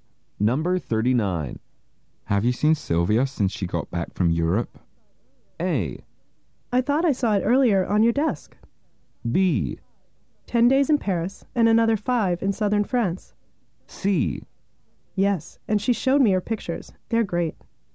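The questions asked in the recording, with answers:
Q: Have you seen Sylvia since she got back from Europe?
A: C: Yes, and she showed me her pictures. They're great.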